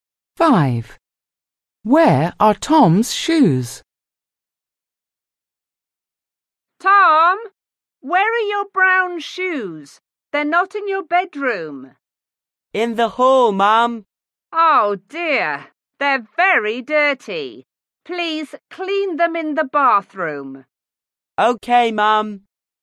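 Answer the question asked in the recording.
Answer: In the hall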